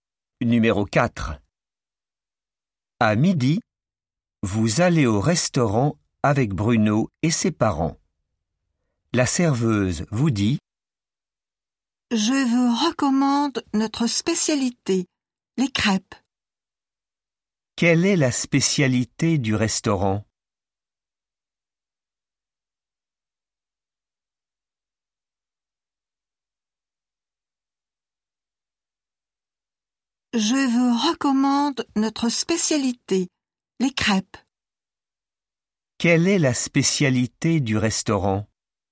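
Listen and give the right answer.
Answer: les crêpes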